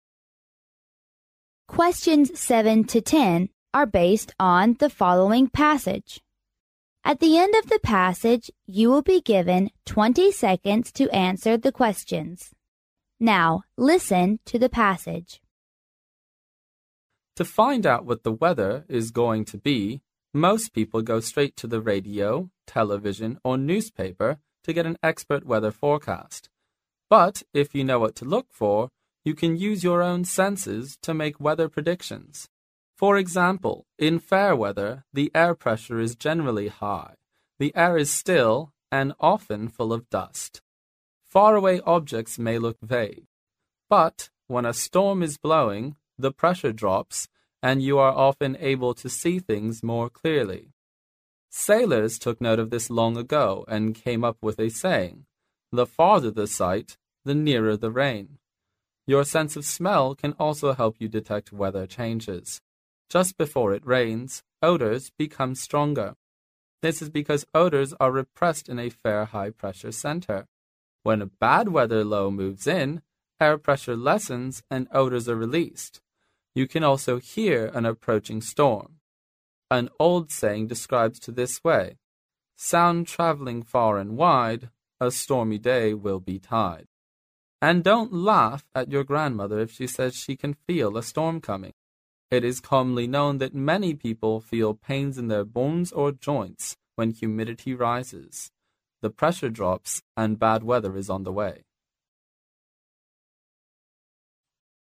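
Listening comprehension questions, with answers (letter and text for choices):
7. Besides experts' weather forecast, you can predict the weather by _____.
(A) precise instrument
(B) your own sense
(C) compute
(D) magic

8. When a storm is blowing, what will happen?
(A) The air will be still.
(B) The air will be full of dust.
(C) Faraway objects may look vague.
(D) The pressure will drop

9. Your sense of smell can also help you detect weather changes because_____.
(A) before raining, odors become stronger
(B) when raining, odors are repressed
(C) odors are released on sunny days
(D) odors become stronger on sunny days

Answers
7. (B) your own sense
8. (D) The pressure will drop
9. (A) before raining, odors become stronger

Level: 英语四级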